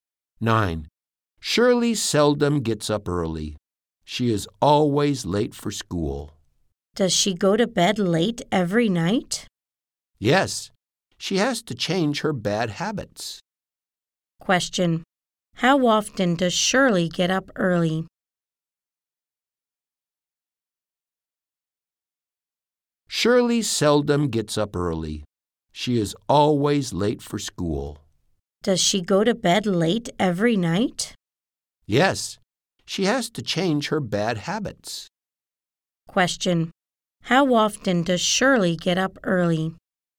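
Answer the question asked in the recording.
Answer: Seldom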